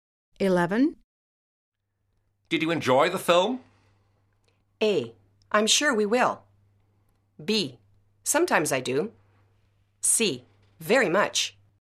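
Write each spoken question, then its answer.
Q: Did you enjoy the film?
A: C: Very much.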